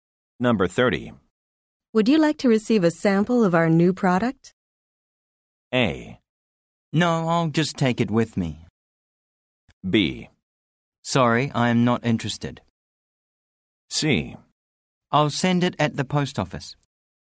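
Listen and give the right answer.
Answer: B: Sorry, I am not interested.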